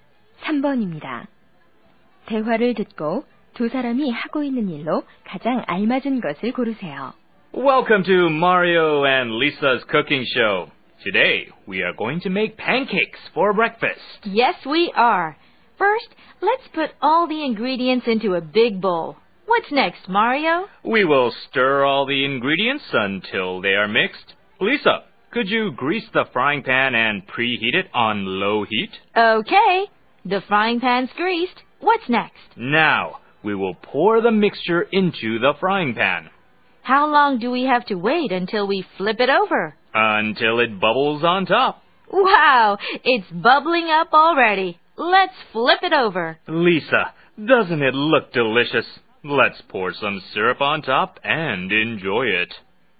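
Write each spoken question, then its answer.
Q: 대화를 듣고 두 사람이 하고 있는 일로 가장 알맞은 것을 고르세요.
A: 요리 프로그램에서 팬케이크 만들기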